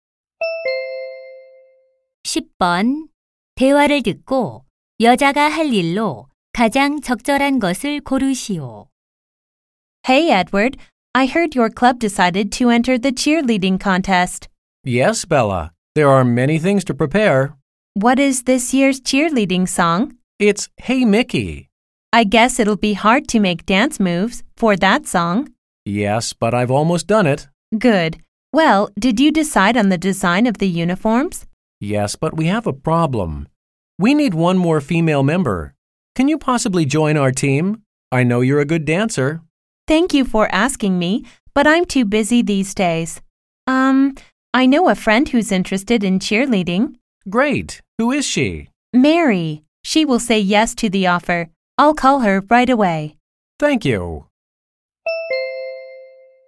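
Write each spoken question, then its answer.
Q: 대화를 듣고 여자가 할 일로 가장 적절한 것을 고르시오.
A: Mary에게 전화하기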